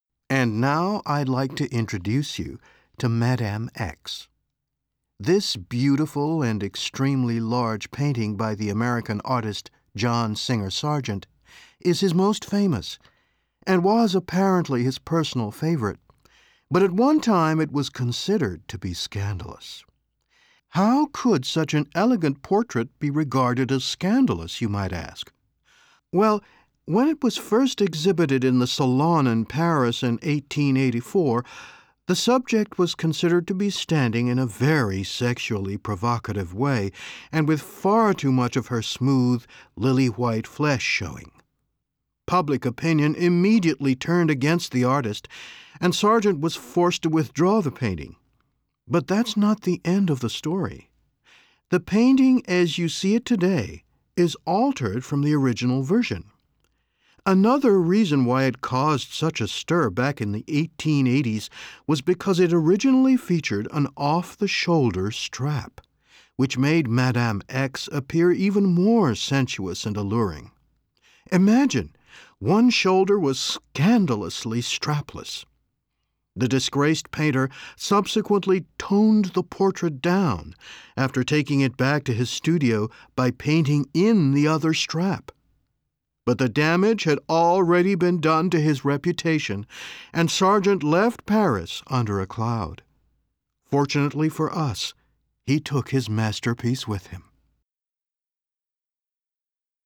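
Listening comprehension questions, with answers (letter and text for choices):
Kuuntele teksti täältä ja vastaa alla oleviin kysymyksiin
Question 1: 'Madame X' was removed from the exhibition because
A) the painting was simply too large.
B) it offended the moral standards of the time.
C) the portrait eas of scandalous woman.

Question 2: The painting as we see it now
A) is no longer as provocative as it used to be.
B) continues to arouse strong feelings.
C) was discovered in the artist's art studion in Paris.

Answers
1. B) it offended the moral standards of the time.
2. A) is no longer as provocative as it used to be.

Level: Course 3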